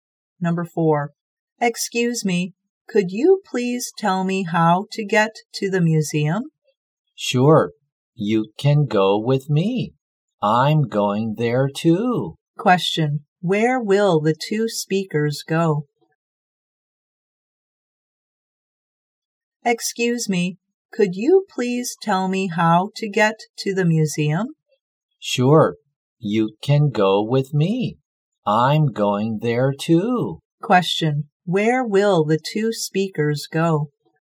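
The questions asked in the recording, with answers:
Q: Question, where will the two speakers go?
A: To the museum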